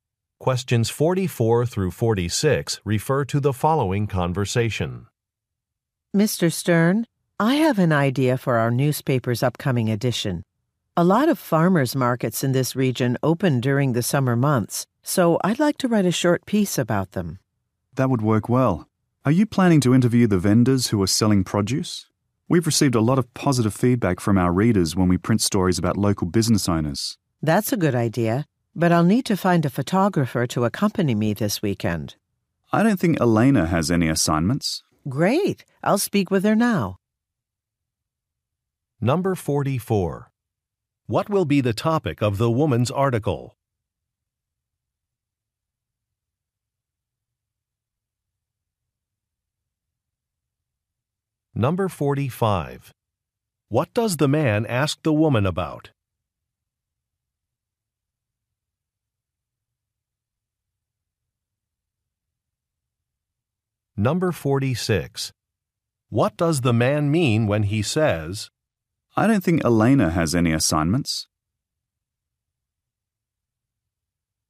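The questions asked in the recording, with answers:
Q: What will be the topic of the woman's article?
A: Local farmers' markets

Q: What does the man ask the woman about?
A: Whether she will interview the vendors

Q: What does the man mean when he says,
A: Elena is available to go as the photographer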